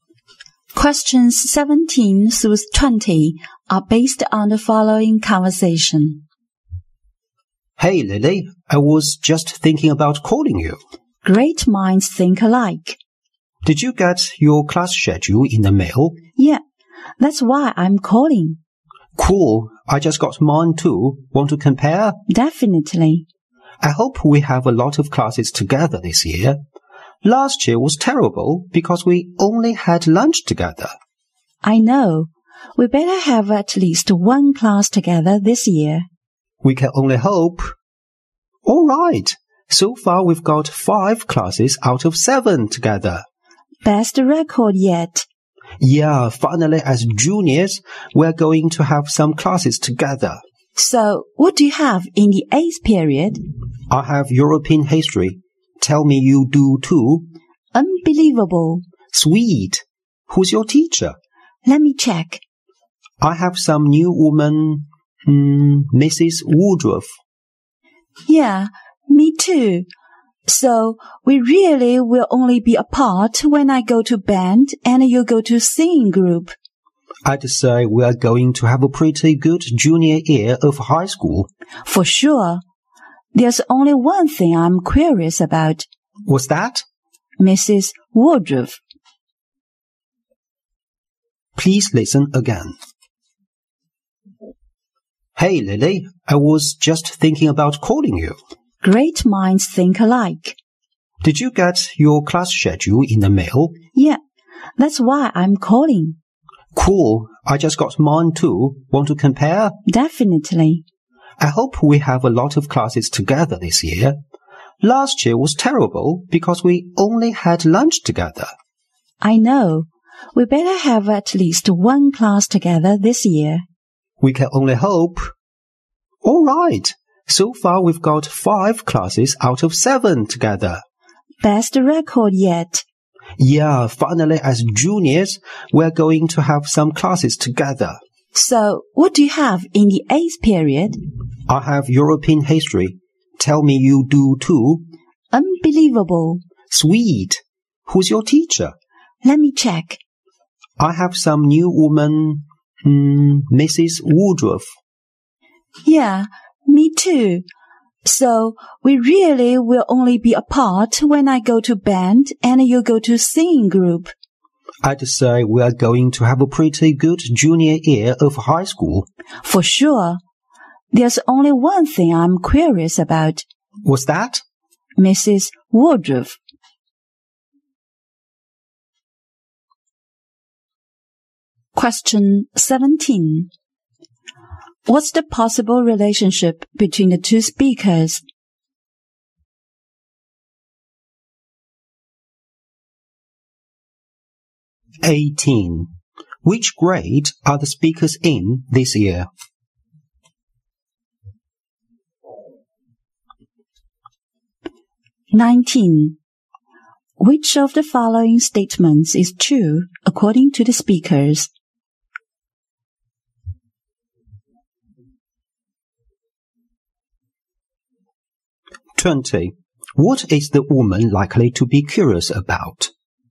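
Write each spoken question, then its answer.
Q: What's the possible relationship between the two speakers?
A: Friends and classmates

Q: Which grade are the speakers in this year?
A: Junior year of high school (11th grade)

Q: What is the woman likely to be curious about?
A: Their new teacher, Mrs. Woodruff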